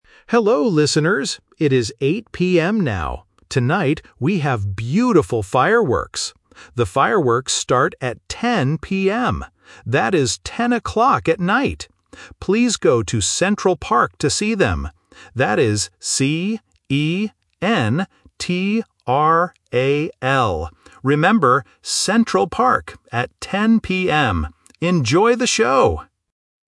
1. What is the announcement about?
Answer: Fireworks

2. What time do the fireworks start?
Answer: 10:00 PM

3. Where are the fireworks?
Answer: Central Park

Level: A1